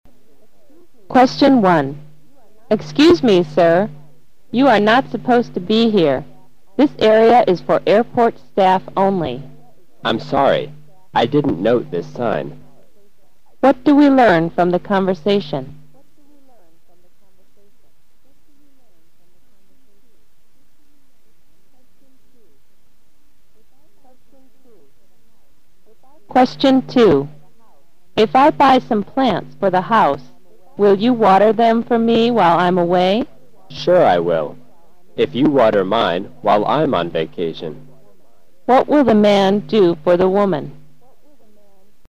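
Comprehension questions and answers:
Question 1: Q: What do we learn from the conversation?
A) The woman feels sorry for the man.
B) The man is a member of the staff.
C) The area is for passengers only.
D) The woman is asking the man to leave.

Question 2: Q: What will the man do for the woman?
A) Clean her house while she is away.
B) Buy her some plants and take care of them.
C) Water her plants while she is away.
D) Water her plants when he is not at work.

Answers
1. D) The woman is asking the man to leave.
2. C) Water her plants while she is away.

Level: 四级

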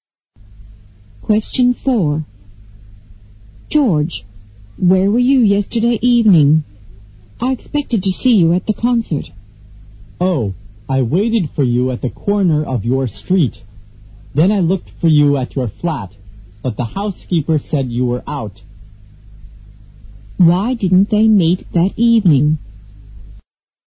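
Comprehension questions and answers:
Q: Why didn't they meet that evening?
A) They were both busy doing their own work.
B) They waited for each other at different places.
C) They went to the street corner at different times.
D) The man went to the concert but the woman didn't.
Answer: B) They waited for each other at different places.

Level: 六级

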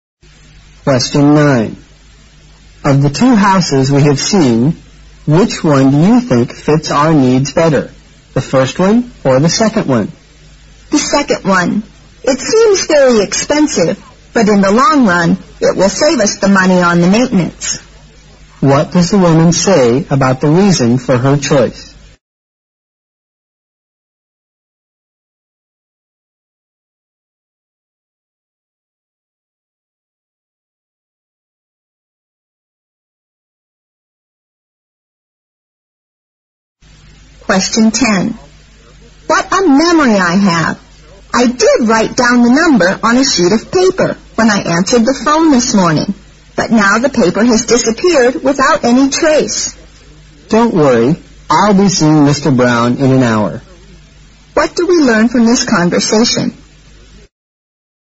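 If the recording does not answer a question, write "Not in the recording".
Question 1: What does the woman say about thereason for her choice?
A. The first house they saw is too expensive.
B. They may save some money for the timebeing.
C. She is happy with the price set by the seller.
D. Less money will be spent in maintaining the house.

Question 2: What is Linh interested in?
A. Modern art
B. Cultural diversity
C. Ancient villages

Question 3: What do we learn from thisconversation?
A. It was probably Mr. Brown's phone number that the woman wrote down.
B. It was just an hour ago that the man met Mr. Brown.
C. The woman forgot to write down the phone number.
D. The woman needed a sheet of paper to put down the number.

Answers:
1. D. Less money will be spent in maintaining the house.
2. Not in the recording
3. A. It was probably Mr. Brown's phone number that the woman wrote down.

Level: 六级

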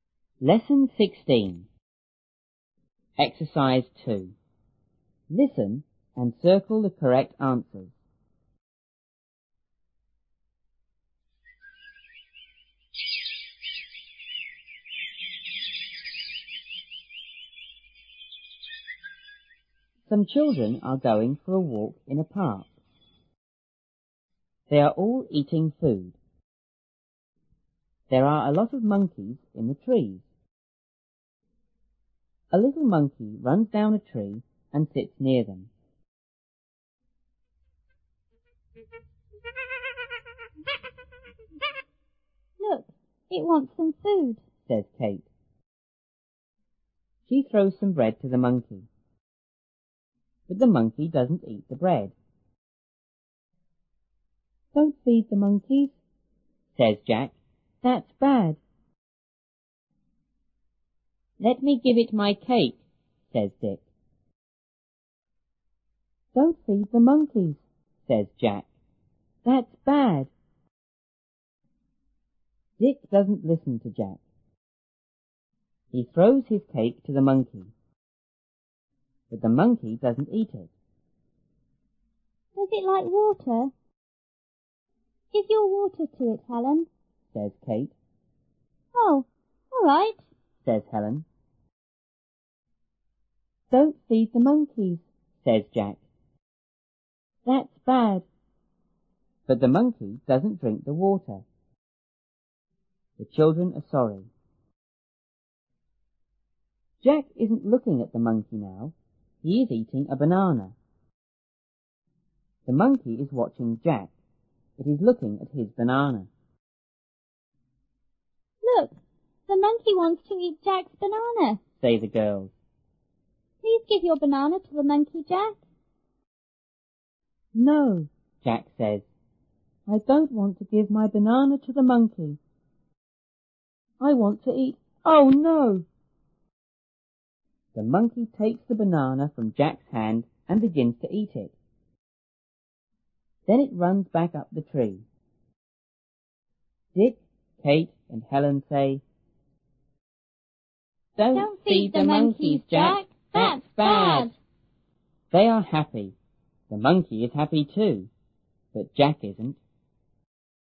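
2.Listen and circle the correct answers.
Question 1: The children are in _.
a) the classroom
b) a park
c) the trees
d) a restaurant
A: b) a park

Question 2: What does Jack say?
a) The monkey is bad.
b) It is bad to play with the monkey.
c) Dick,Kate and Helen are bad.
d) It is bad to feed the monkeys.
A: d) It is bad to feed the monkeys.

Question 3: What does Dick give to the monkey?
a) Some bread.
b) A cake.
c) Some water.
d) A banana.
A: b) A cake.

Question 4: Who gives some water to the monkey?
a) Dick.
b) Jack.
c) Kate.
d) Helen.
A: d) Helen.

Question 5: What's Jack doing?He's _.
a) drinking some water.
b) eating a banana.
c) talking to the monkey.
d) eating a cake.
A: b) eating a banana.

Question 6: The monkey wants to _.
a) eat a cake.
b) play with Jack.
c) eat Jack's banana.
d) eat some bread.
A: c) eat Jack's banana.

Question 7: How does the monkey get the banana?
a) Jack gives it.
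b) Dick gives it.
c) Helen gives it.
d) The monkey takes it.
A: d) The monkey takes it.

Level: 初中英语广州版1B

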